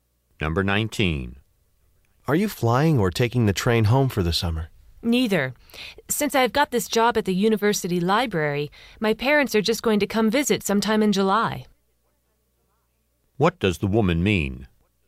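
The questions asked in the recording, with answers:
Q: What does the woman mean?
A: She isn't going home; she'll stay for her library job and her parents will visit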